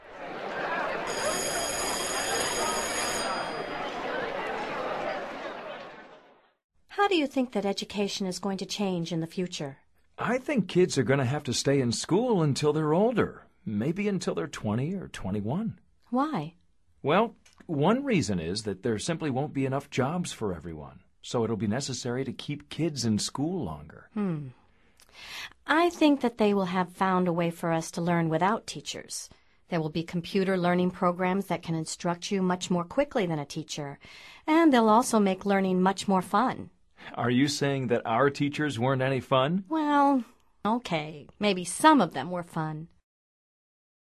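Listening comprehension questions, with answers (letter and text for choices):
Activity 121: Basándote en los comentarios anteriores, selecciona las opciones más adecuadas. Verifica luego las respuestas correctas.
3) Dialogue # 4 suggests that ...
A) kids are going to stay in school until 30.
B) there will be enough jobs for everyone.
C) children are going to stay in school longer.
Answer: C) children are going to stay in school longer.

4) Dialogue # 4 also suggests that ...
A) there will be a way to learn without teachers.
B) there will be teachers teaching online.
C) there won't be learning programs instructing you.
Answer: A) there will be a way to learn without teachers.

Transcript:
How do you think that education is going to change in the future?
I think kids are going to have to stay in school until they're older – maybe until they're 20 or 21.
Why?
Well, one reason is that there simply won't be enough jobs for everyone, so it will be necessary to keep kids in school longer.
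I think that they will have found a way for us to learn without teachers. There will be computer learning programs that can instruct you much more quickly than a teacher, and they'll also make learning much more fun.
Are you saying that our teachers weren't any fun?
Well ... OK. Maybe some of them were fun.

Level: Nivel Avanzado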